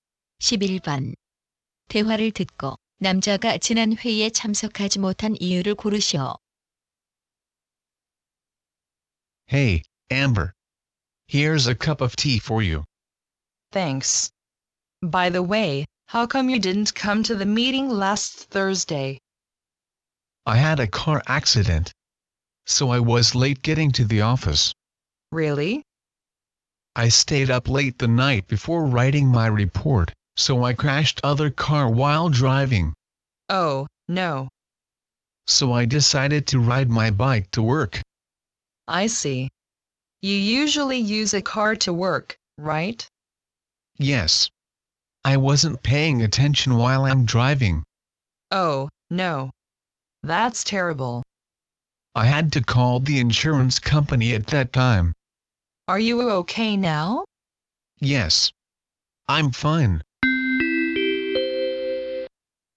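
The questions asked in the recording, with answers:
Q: 대화를 듣고 남자가 지난 회의에 참석하지 못한 이유를 고르시오.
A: 교통사고가 나서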